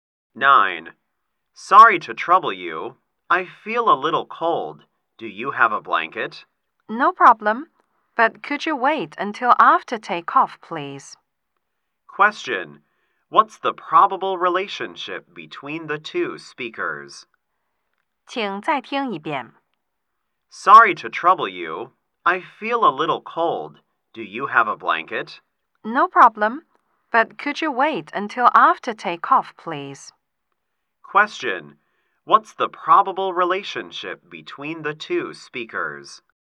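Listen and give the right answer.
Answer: Passenger and flight attendant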